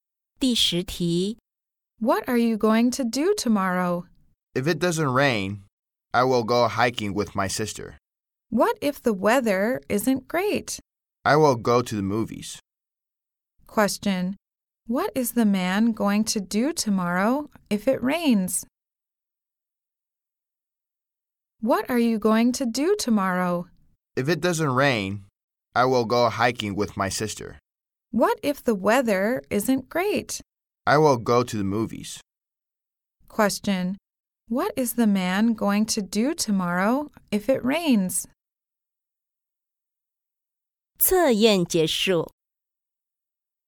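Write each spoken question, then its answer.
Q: What is the man going to do tomorrow if it rains?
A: Go to the movies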